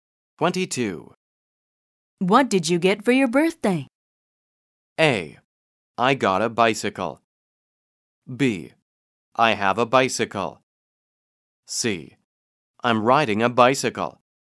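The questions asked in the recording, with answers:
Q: What did you get for your birthday?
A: A: I got a bicycle.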